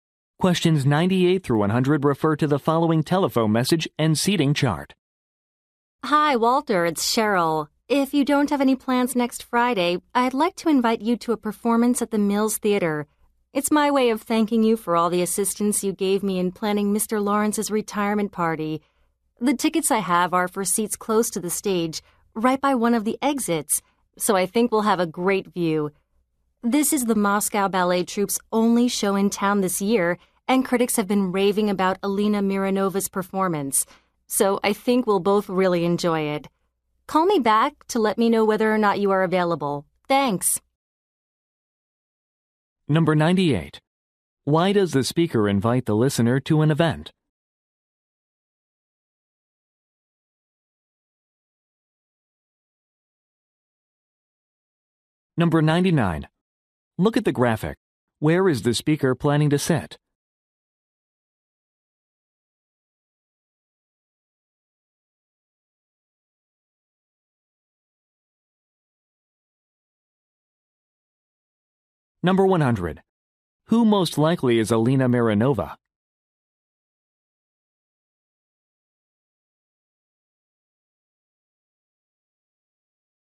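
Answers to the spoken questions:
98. To thank him for helping plan a retirement party
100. A ballet dancer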